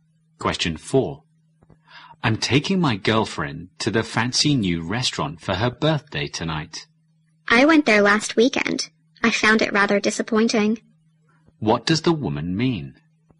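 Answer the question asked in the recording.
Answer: The new restaurant is disappointing.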